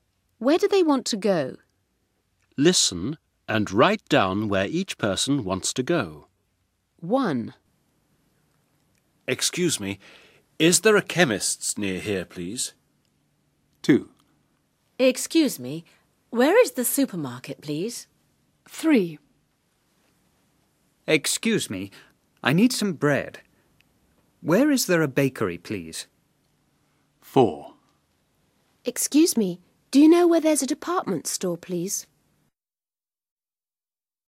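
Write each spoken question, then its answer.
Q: Where do they want to go?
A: a chemist's

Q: Where do they want to go?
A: the supermarket

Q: Where do they want to go?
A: a bakery

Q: Where do they want to go?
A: a department store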